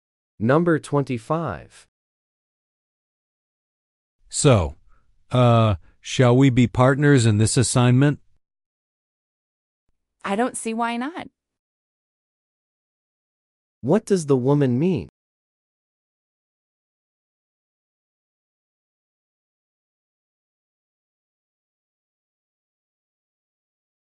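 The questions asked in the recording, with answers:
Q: What does the woman mean?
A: She agrees to be his partner for the assignment.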